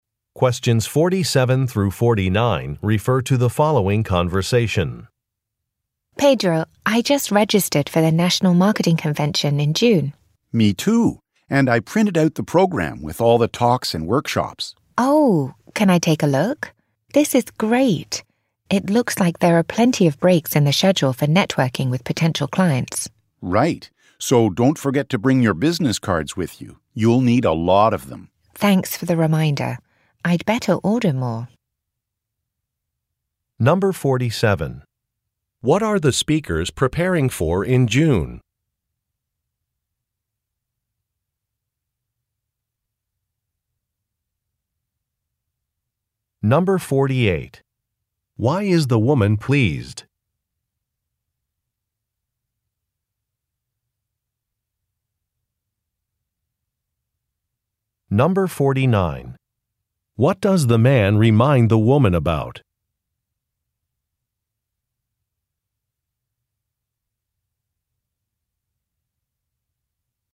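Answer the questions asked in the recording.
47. The National Marketing Convention
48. The schedule has plenty of breaks for networking with potential clients
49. To bring her business cards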